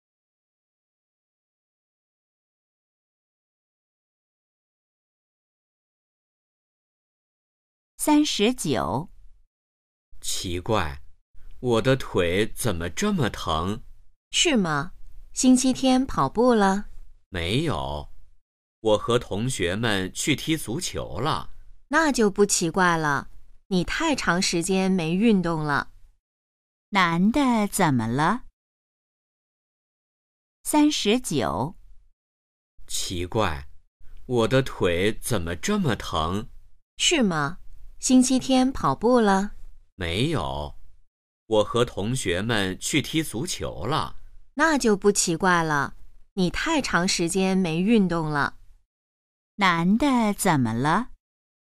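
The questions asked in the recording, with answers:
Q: 男的怎么了?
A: 腿疼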